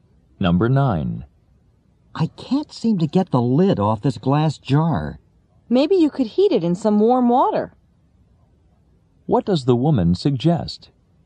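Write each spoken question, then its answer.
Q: What does the woman suggest?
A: Heating the jar in warm water.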